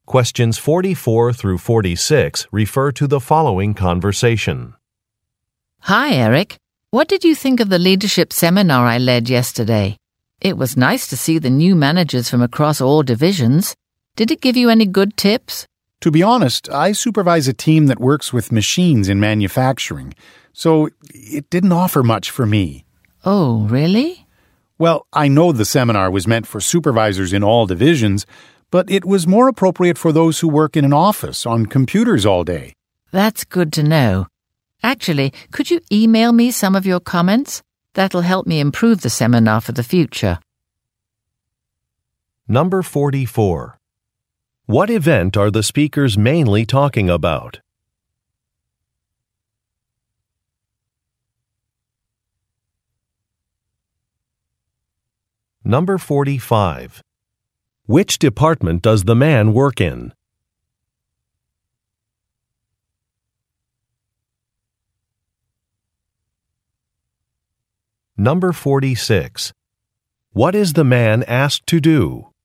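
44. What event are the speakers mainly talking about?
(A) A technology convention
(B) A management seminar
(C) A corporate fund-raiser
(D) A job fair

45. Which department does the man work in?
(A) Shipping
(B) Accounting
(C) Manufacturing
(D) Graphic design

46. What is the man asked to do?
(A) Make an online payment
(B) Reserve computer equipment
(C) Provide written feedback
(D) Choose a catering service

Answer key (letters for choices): 44B, 45C, 46C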